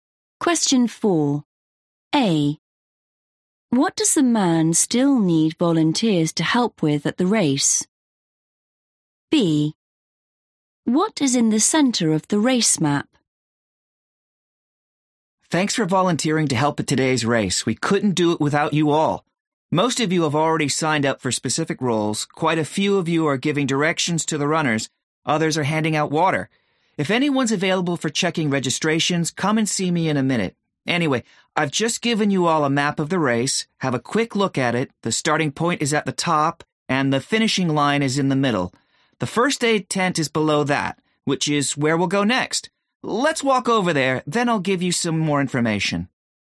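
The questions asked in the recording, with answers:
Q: What does the man still need volunteers to help with at the race?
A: checking registrations

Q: What is in the centre of the race map?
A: the finishing line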